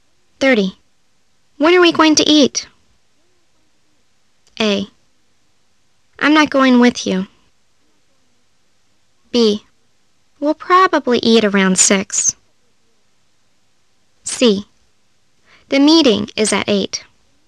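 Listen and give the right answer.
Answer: B: We'll probably eat around 6.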